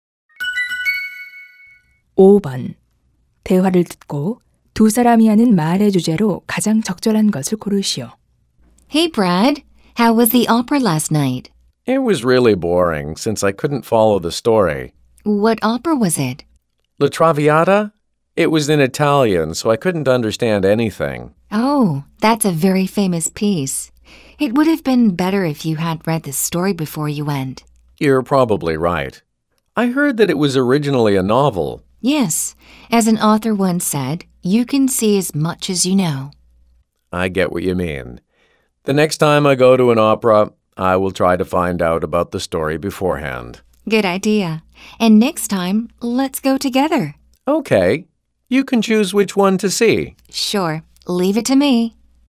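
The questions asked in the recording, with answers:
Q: 대화를 듣고 두 사람이 하는 말의 주제로 가장 적절한 것을 고르시오.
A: 오페라를 보기 전에 줄거리를 미리 알아 두는 것의 중요성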